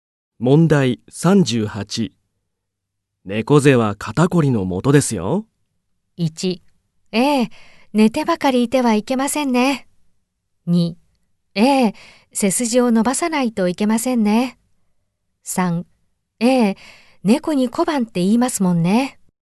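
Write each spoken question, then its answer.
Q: 猫背は肩こりのもとですよ。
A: 2: ええ、背筋を伸ばさないといけませんね。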